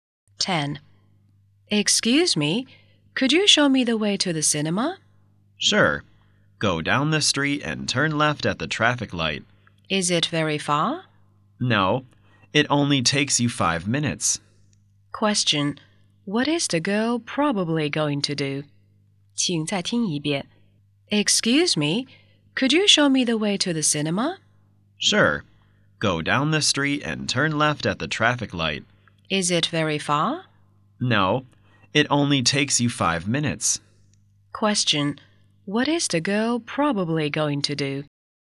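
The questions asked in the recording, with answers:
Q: What is the girl probably going to do?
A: Go to the cinema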